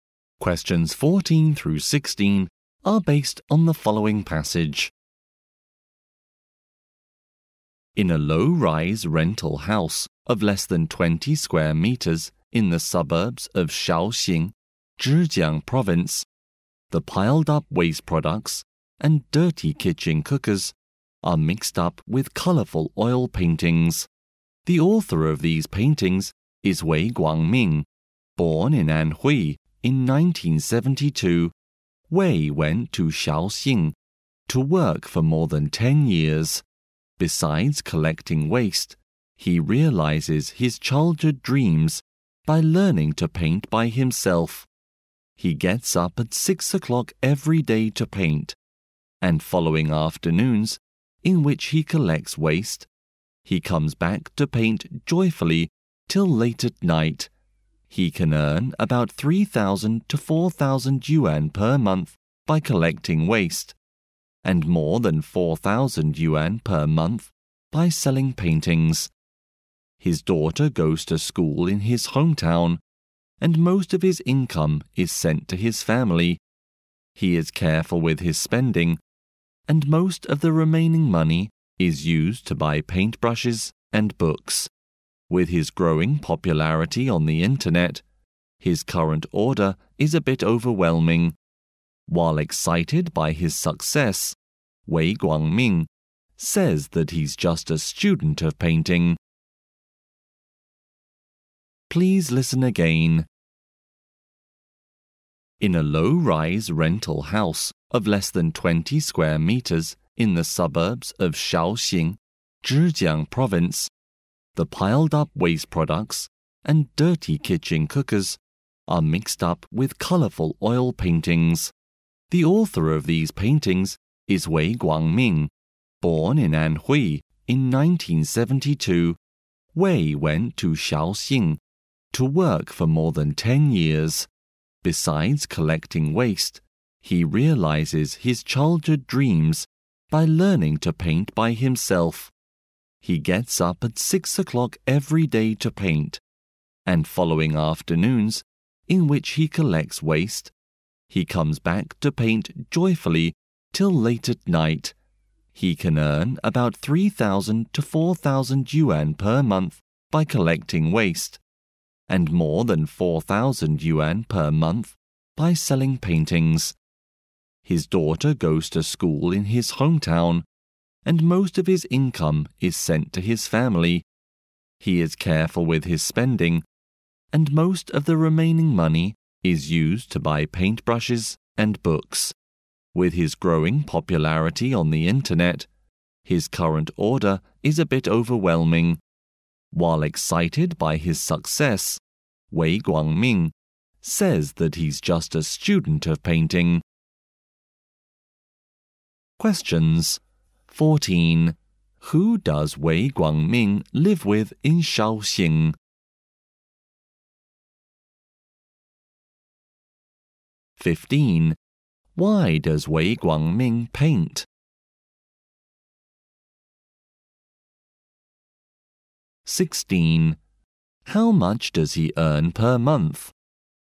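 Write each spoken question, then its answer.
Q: Why does Wei Guangming paint?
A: To realize his childhood dream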